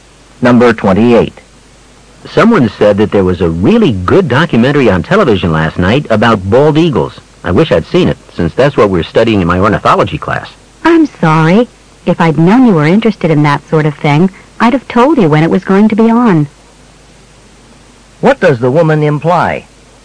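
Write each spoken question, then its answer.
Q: What does the woman imply?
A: She knew about the program but didn't know he'd be interested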